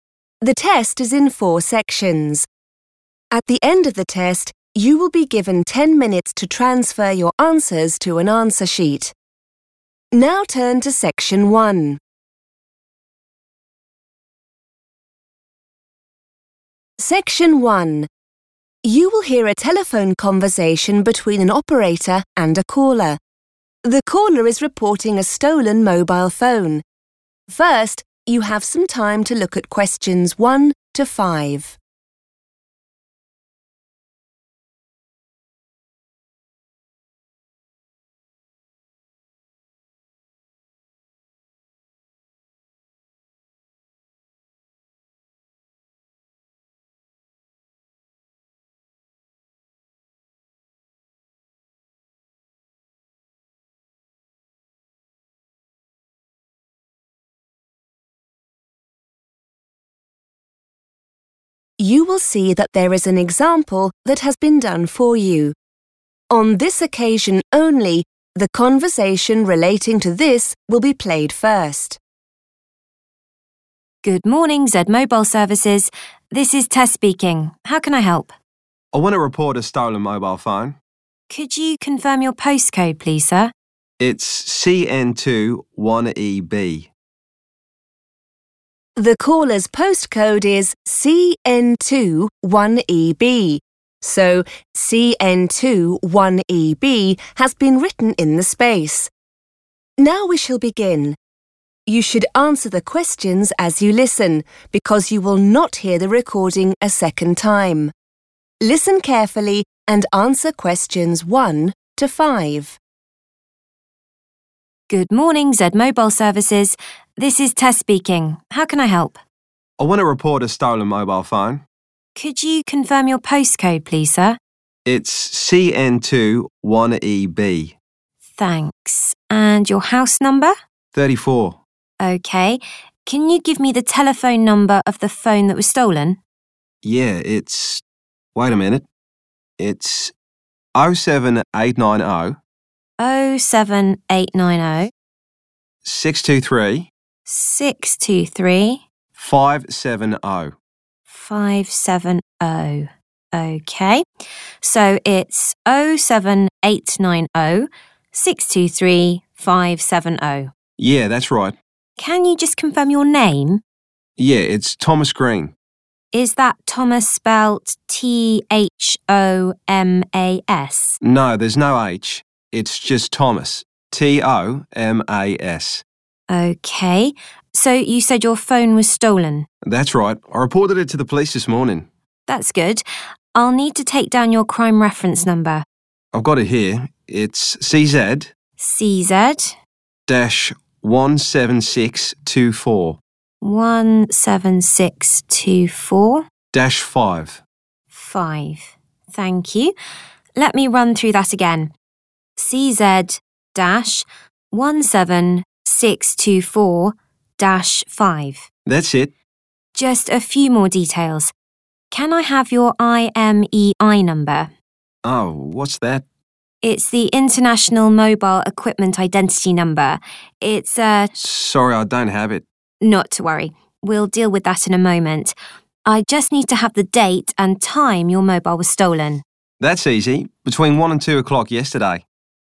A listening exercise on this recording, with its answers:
Complete the details in the form below. Write NO MORE THAN ONE WORD AND/OR A NUMBER for each answer.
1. 07890 _____ 570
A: 623

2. _____ Green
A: Tomas

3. CZ- _____ -5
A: 17624

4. _____ Mobile Equipment Identity (IMEI) number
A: International

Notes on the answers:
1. The correct answer is 623 because the caller provides his phone number in three separate sections during the conversation. He first mentions '07890', then says '623', and finishes with '570'. Since the form already fills in the first and last sections, 623 is the specific number needed to complete the sequence of the full phone number.
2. The correct answer is Tomas because when the operator asks for the caller's name, he says his name is Tomas Green. He also clarifies the spelling of his first name as T-O-M-A-S, which matches the answer.
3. The correct answer is 17624 because this is the middle part of the crime reference number that the caller gives to the operator. A crime reference number is a unique code from the police used to identify a specific reported incident. The caller reads the code in three pieces: the letters 'CZ', the numbers '17624', and the final digit '5'. The operator then repeats the complete sequence to verify that '17624' is correct.
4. The correct answer is 'International' because the worker explains that the short name 'IMEI' stands for 'International Mobile Equipment Identity'. The form already has the words 'Mobile Equipment Identity', so the first word must be 'International' to complete the correct title.